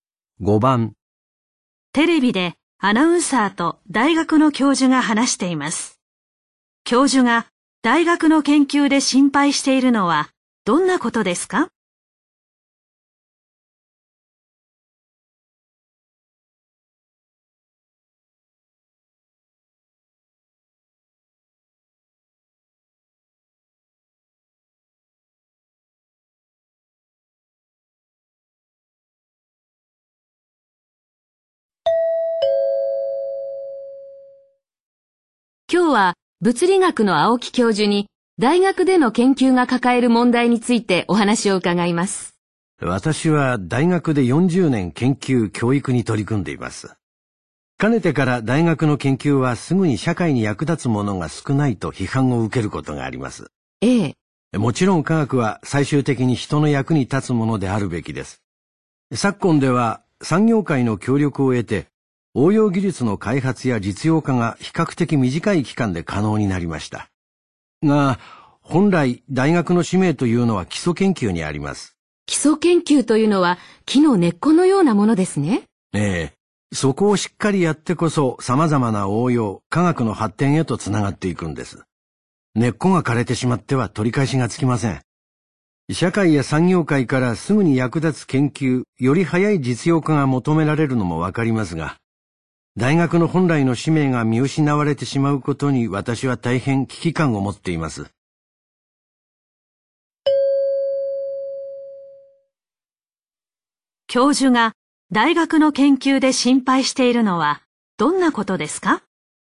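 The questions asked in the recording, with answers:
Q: 大学の研究で心配しているのはどんなことですか?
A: すぐに役立つ研究が求められ、大学本来の使命である基礎研究が見失われること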